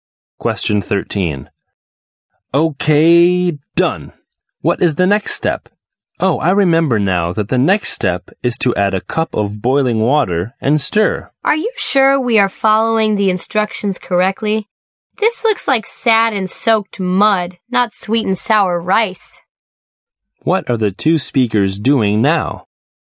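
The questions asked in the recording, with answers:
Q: What are the two speakers doing now?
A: Cooking sweet and sour rice by following a recipe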